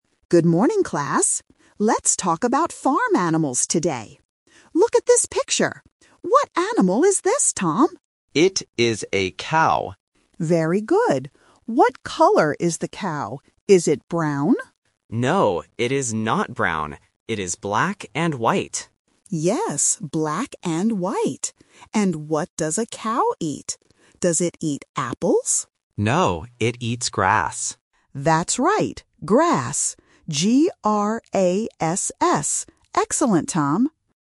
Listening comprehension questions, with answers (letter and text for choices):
Listen to the conversation and choose the correct answer (A, B, or C).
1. What animal are they talking about?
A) A horse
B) A cow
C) A sheep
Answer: B) A cow

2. What color is the animal?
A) Brown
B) Black and white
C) Red and white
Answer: B) Black and white

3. What does the animal eat?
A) Apples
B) Corn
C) Grass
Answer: C) Grass

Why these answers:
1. The student clearly says, "It is a cow." Options (A) and (C) are other farm animals but are not mentioned in the audio.
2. The student says, "It is black and white," and the teacher repeats it. Option (A) "Brown" is a trap because the teacher asks "Is it brown?", but the student rejects it by saying "No, it is not brown."
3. The student answers that the cow eats "grass," and the teacher spells the word "G-R-A-S-S". Option (A) "Apples" is a trap because the teacher asks "Does it eat apples?", but the student says no. Option (B) is not mentioned.

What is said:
Teacher: Good morning, class. Let's talk about farm animals today. Look at this picture. What animal is this, Tom?
Student (Tom): It is a cow.
Teacher: Very good. What color is the cow? Is it brown?
Student (Tom): No, it is not brown. It is black and white.
Teacher: Yes, black and white. And what does a cow eat? Does it eat apples?
Student (Tom): No, it eats grass.
Teacher: That's right. Grass. G-R-A-S-S. Excellent, Tom!

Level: A1